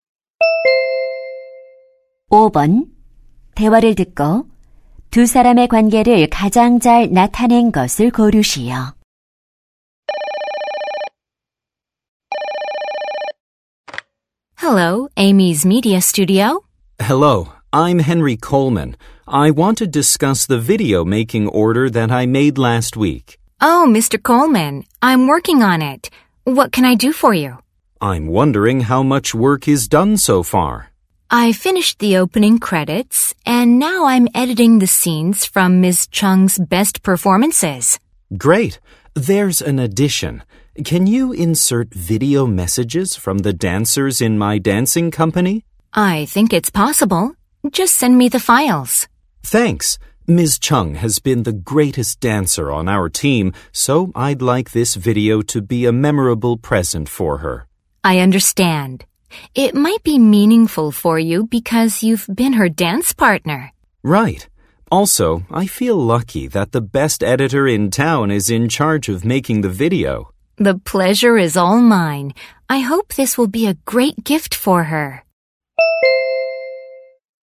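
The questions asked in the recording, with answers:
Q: 대화를 듣고 두 사람의 관계를 가장 잘 나타낸 것을 고르시오.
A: 무용수(영상 의뢰인) - 영상 편집자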